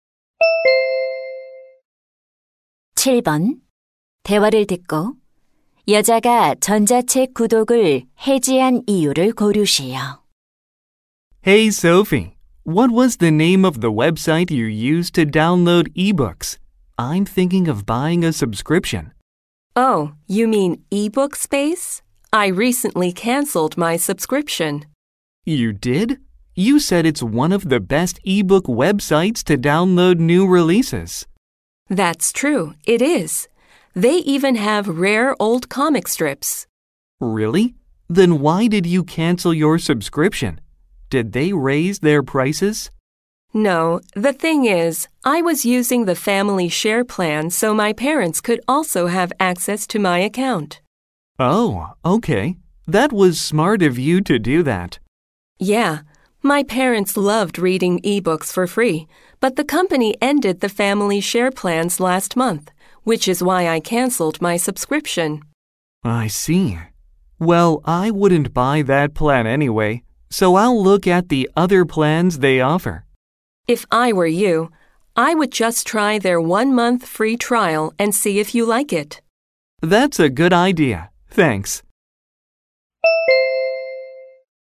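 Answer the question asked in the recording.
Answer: 가족 공유 요금제가 폐지되어서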